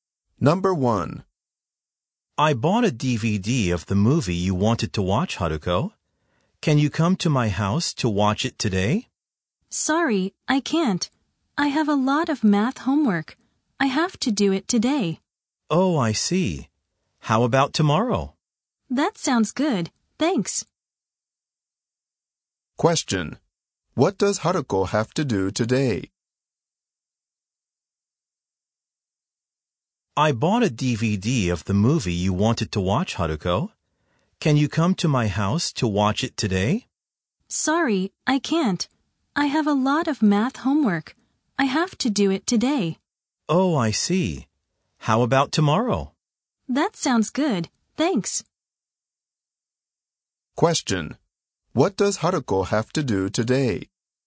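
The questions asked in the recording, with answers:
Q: What does Haruko have to do today?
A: Her math homework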